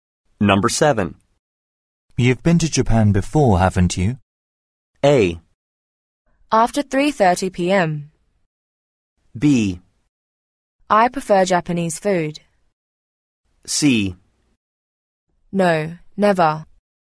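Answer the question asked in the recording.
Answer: C: No, never.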